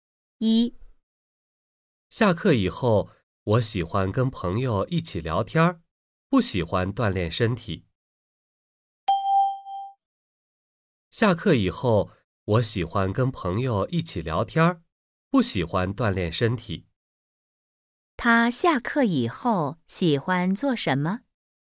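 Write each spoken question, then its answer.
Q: 他下课以后喜欢做什么?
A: 跟朋友一起聊天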